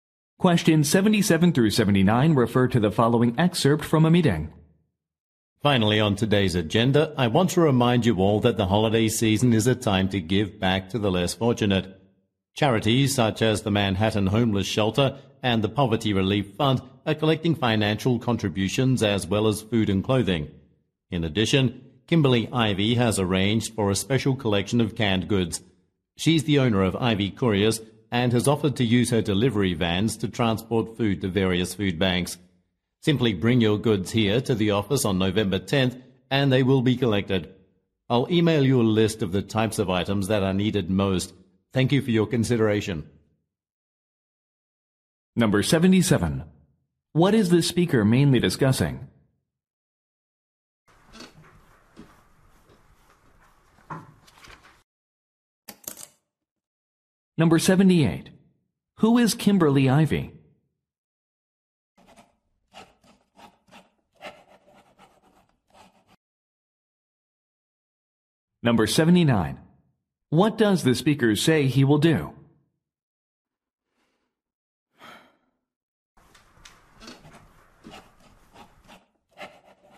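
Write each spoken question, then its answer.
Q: What is the speaker mainly discussing?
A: Charity donations for the holiday season

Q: Who is Kimberly Ivy?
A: The owner of a courier company, Ivy Couriers

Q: What does the speaker say he will do?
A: Email a list of the items needed most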